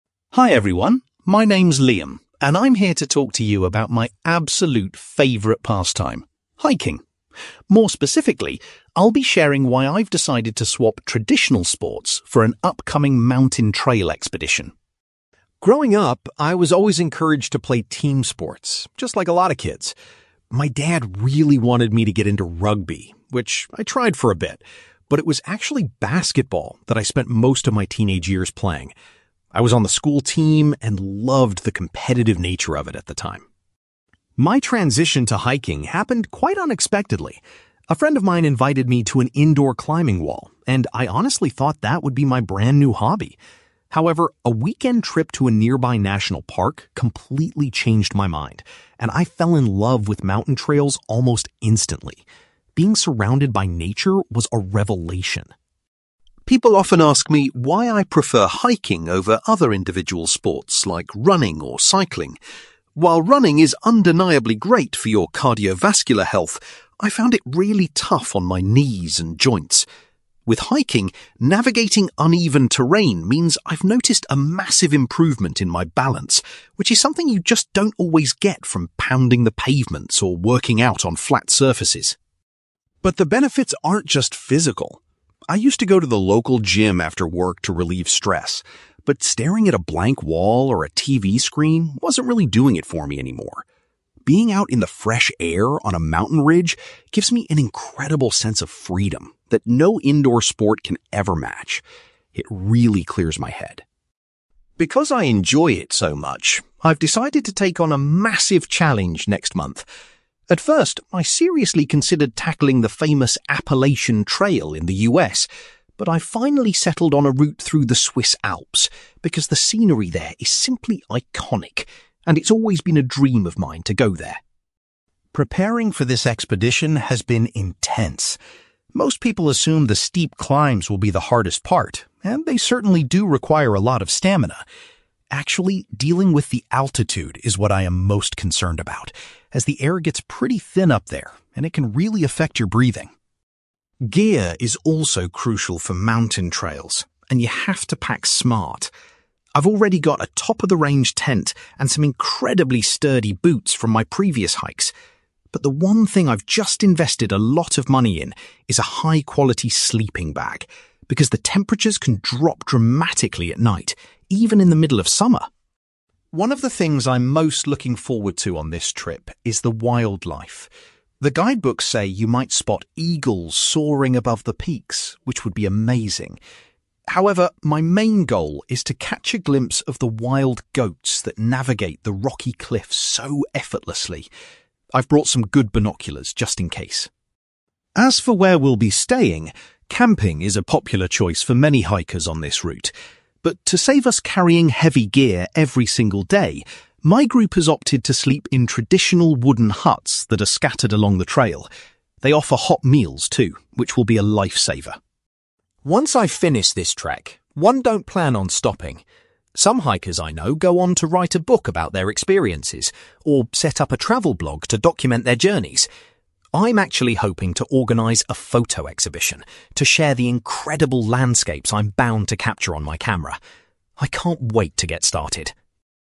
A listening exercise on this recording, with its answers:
You will hear a man called Liam talking about his passion for hiking and an upcoming mountain expedition. For questions 9-18, complete the sentences with a word or short phrase.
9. Liam played (9) .......................................... for a significant part of his youth before getting into hiking.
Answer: basketball

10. A visit to a (10) .......................................... was the event that originally inspired Liam's passion for the mountains.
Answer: national park

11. Liam has observed that hiking has greatly improved his (11) .......................................... compared to other forms of exercise.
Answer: balance

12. For Liam, the feeling of (12) .......................................... he gets from being in the mountains is unmatched by indoor activities.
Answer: freedom

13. Liam's upcoming hiking expedition will take place in the (13) .......................................... .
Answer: Swiss Alps

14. Liam admits that the (14) .......................................... is the aspect of the hike he is most worried about.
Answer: altitude

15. Liam recently spent a considerable amount of money on a (15) .......................................... to keep him warm at night.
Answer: sleeping bag

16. Liam is particularly keen to see some (16) .......................................... while trekking in the mountains.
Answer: wild goats

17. Liam's group has chosen to stay in (17) .......................................... rather than pitching tents every night.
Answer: wooden huts

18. After returning from his trip, Liam intends to put together a (18) .......................................... to showcase the scenery.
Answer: photo exhibition

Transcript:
Liam: Hi everyone, my name is Liam, and I'm here to talk to you about my absolute favourite pastime: hiking. More specifically, I'll be sharing why I've decided to swap traditional sports for an upcoming mountain trail expedition.
Growing up, I was always encouraged to play team sports, just like a lot of kids. My dad really wanted me to get into rugby, which I tried for a bit, but it was actually basketball that I spent most of my teenage years playing. I was on the school team and loved the competitive nature of it at the time.
My transition to hiking happened quite unexpectedly. A friend of mine invited me to an indoor climbing wall, and I honestly thought that would be my brand new hobby. However, a weekend trip to a nearby national park completely changed my mind, and I fell in love with mountain trails almost instantly. Being surrounded by nature was a revelation.
People often ask me why I prefer hiking over other individual sports like running or cycling. While running is undeniably great for your cardiovascular health, I found it really tough on my knees and joints. With hiking, navigating uneven terrain means I've noticed a massive improvement in my balance, which is something you just don't always get from pounding the pavements or working out on flat surfaces.
But the benefits aren't just physical. I used to go to the local gym after work to relieve stress, but staring at a blank wall or a TV screen wasn't really doing it for me anymore. Being out in the fresh air on a mountain ridge gives me an incredible sense of freedom that no indoor sport can ever match. It really clears my head.
Because I enjoy it so much, I've decided to take on a massive challenge next month. At first, I seriously considered tackling the famous Appalachian Trail in the US, but I've finally settled on a route through the Swiss Alps because the scenery there is simply iconic, and it's always been a dream of mine to go there.
Preparing for this expedition has been intense. Most people assume the steep climbs will be the hardest part, and they certainly do require a lot of stamina. Actually, dealing with the altitude is what I am most concerned about, as the air gets pretty thin up there and it can really affect your breathing.
Gear is also crucial for mountain trails, and you have to pack smart. I've already got a top-of-the-range tent and some incredibly sturdy boots from my previous hikes. But the one thing I've just invested a lot of money in is a high-quality sleeping bag, because the temperatures can drop dramatically at night, even in the middle of summer.
One of the things I'm most looking forward to on this trip is the wildlife. The guidebooks say you might spot eagles soaring above the peaks, which would be amazing. However, my main goal is to catch a glimpse of the wild goats that navigate the rocky cliffs so effortlessly. I've brought some good binoculars just in case.
As for where we'll be staying, camping is a popular choice for many hikers on this route. But to save us carrying heavy gear every single day, my group has opted to sleep in traditional wooden huts that are scattered along the trail. They offer hot meals, too, which will be a lifesaver.
Once I finish this trek, I don't plan on stopping. Some hikers I know go on to write a book about their experiences, or set up a travel blog to document their journeys. I'm actually hoping to organise a photo exhibition to share the incredible landscapes I'm bound to capture on my camera. I can't wait to get started!

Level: B2